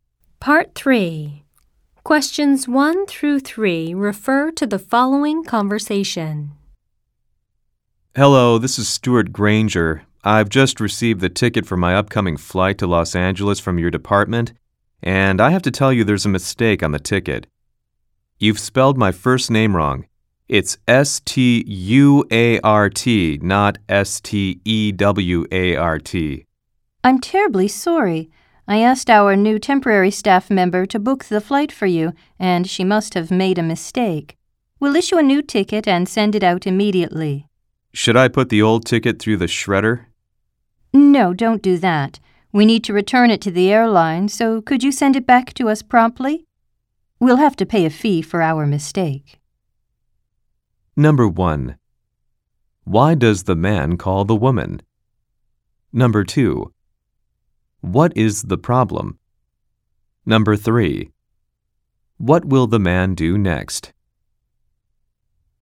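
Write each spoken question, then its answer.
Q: Why does the man call the woman?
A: To report a mistake on his flight ticket

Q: What is the problem?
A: His first name is spelled wrong on the ticket

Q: What will the man do next?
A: Send the old ticket back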